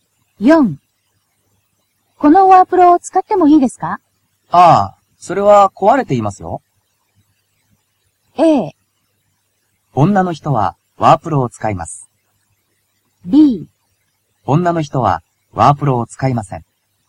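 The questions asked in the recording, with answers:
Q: このワープロを使ってもいいですか?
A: B: 女の人はワープロを使いません。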